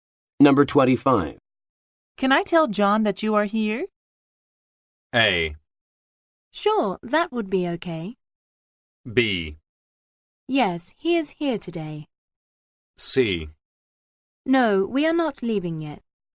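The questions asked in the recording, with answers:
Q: Can I tell John that you are here?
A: A: Sure, that would be okay.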